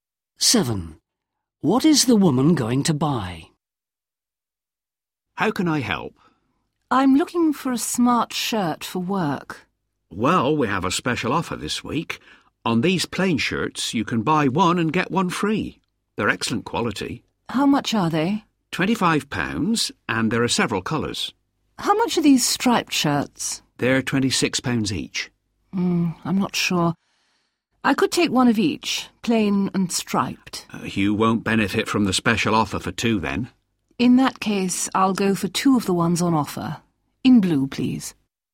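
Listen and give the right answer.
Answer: Two plain blue shirts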